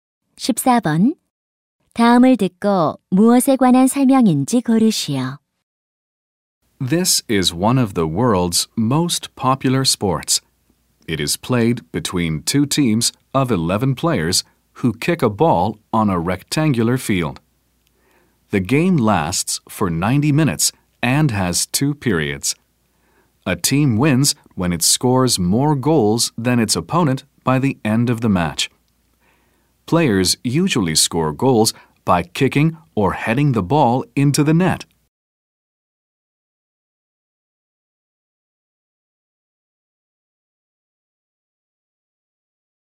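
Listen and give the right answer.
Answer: 축구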